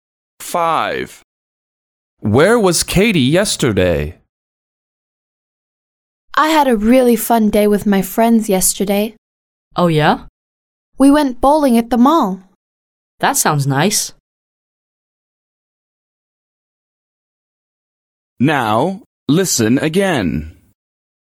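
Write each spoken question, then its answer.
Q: Where was Katie yesterday?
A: At the mall, bowling with friends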